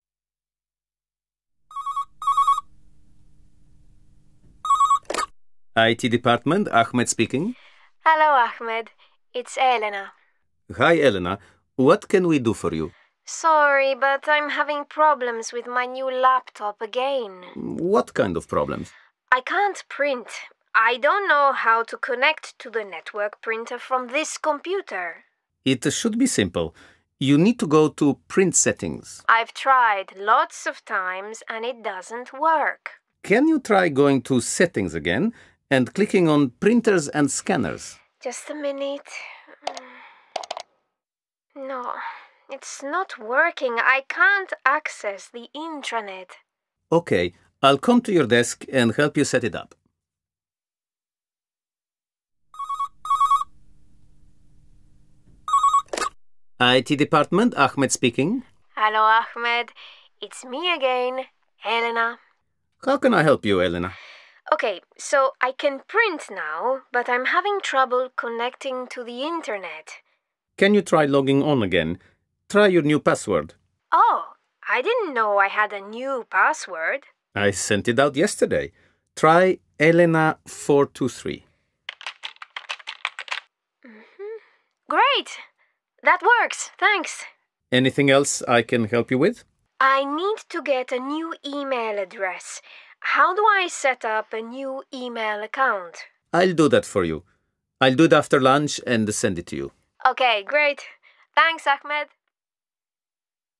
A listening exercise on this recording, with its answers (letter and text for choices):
A. Match 1-10 with a-j to complete the sentences and questions from a conversation between Elena and Ahmed from the IT department. Listen and check.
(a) a new email account?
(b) access the intranet.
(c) your new password.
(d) my new laptop.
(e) for you.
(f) to Print Settings.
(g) email address.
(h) to Setting again?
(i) to connect to the network printer.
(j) connecting to the internet.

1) I'm having problems with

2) I don't know how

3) You need to do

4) Can you try going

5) I can't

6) I'm having trouble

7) Try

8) I need to get a new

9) How do I set up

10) I'll do that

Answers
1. (d) my new laptop.
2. (i) to connect to the network printer.
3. (f) to Print Settings.
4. (h) to Setting again?
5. (b) access the intranet.
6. (j) connecting to the internet.
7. (c) your new password.
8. (g) email address.
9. (a) a new email account?
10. (e) for you.